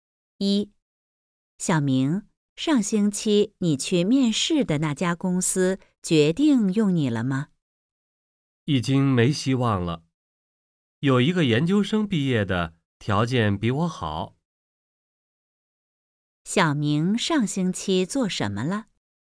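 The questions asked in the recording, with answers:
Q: 小明上星期做什么了?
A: 去一家公司面试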